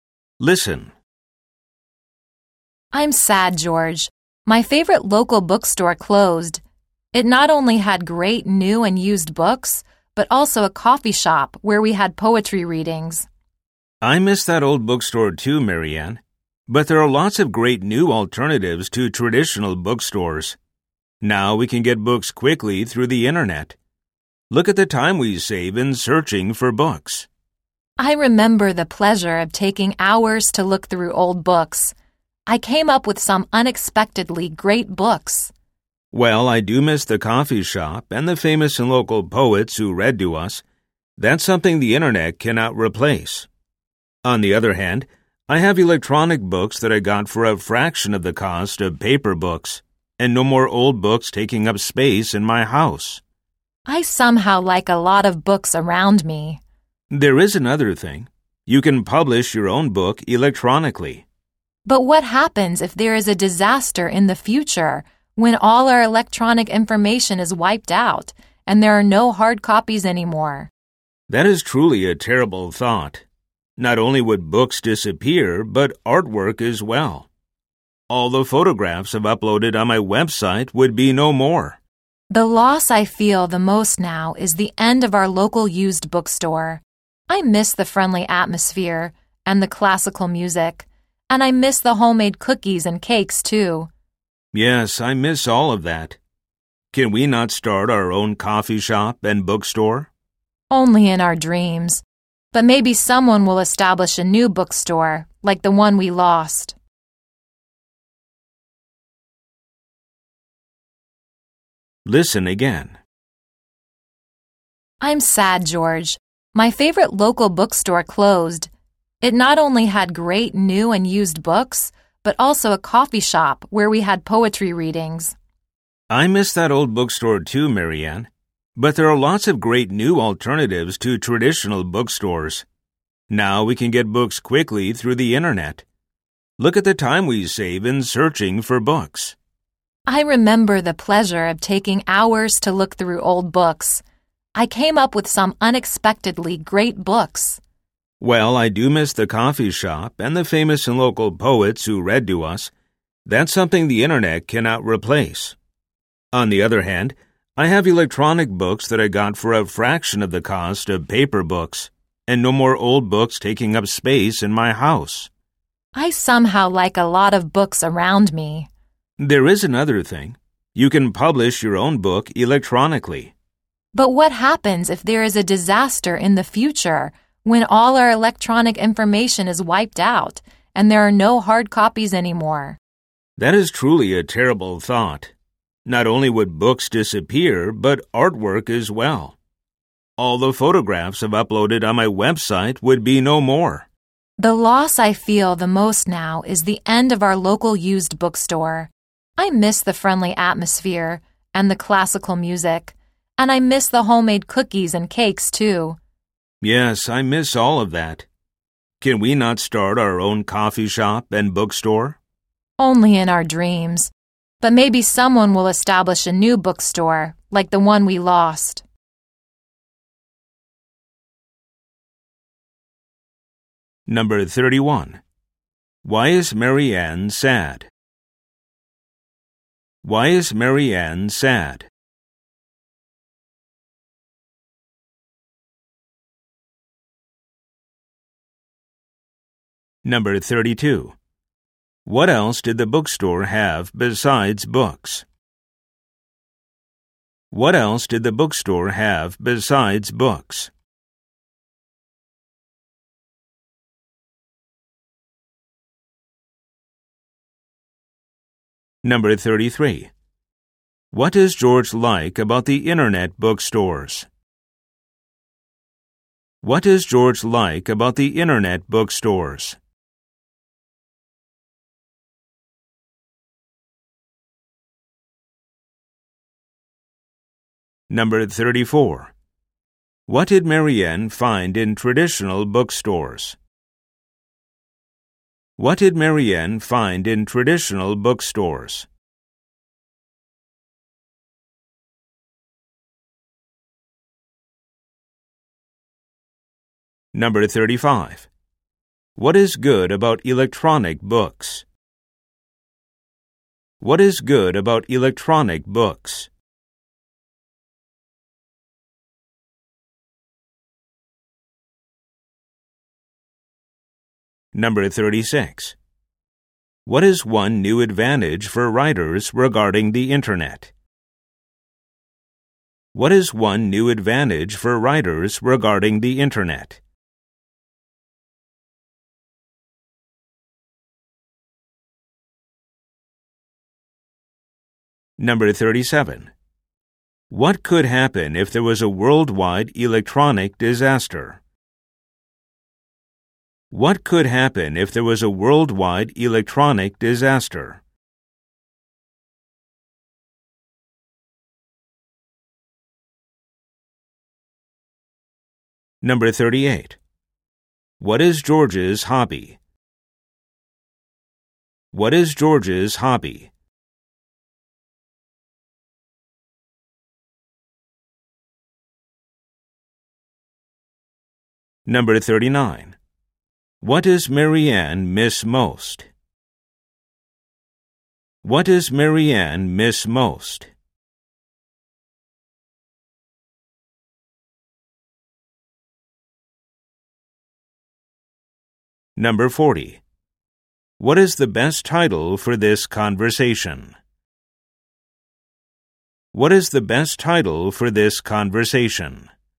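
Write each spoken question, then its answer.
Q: Why is Marianne sad?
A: Her favorite local bookstore closed

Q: What else did the bookstore have besides books?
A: A coffee shop with poetry readings

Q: What does George like about the internet bookstores?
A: You can get books quickly and save time searching

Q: What did Marianne find in traditional bookstores?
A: Unexpectedly great books

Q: What is good about electronic books?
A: They cost a fraction of paper books and take up no space

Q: What is one new advantage for writers regarding the internet?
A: They can publish their own books electronically

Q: What could happen if there was a worldwide electronic disaster?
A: All electronic books and artwork could be wiped out with no hard copies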